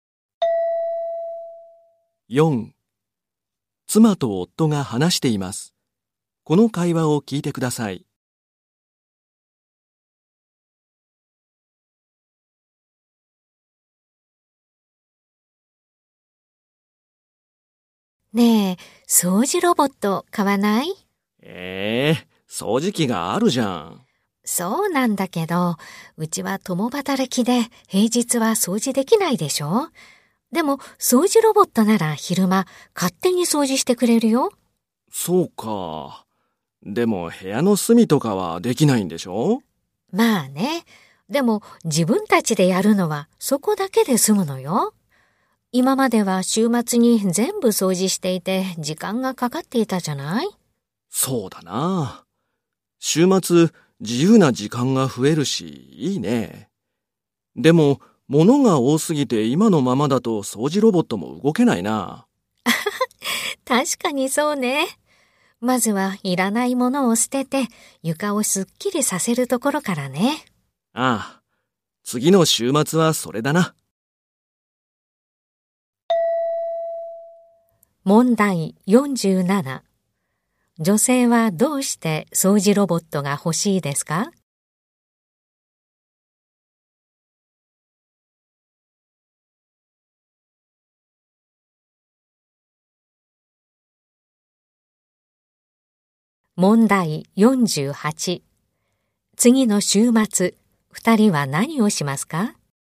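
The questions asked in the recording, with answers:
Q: 女性はどうして掃除ロボットが欲しいですか?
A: 共働きで平日は掃除できないが、ロボットなら昼間に掃除してくれるから

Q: 次の週末、二人は何をしますか?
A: いらないものを捨てて床を片付ける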